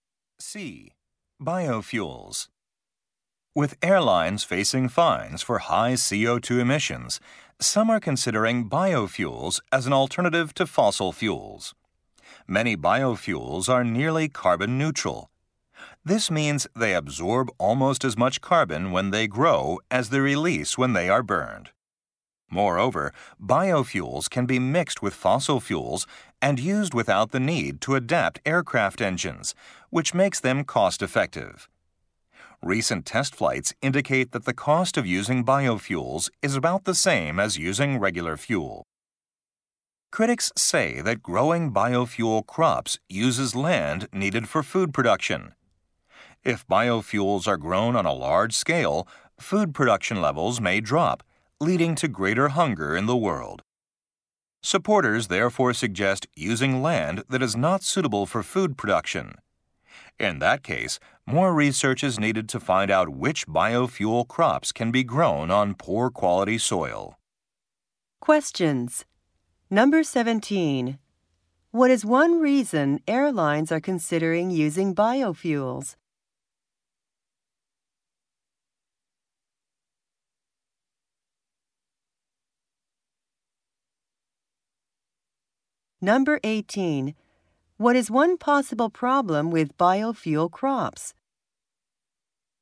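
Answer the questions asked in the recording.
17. To avoid fines for high CO2 emissions.
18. They use land needed for food production.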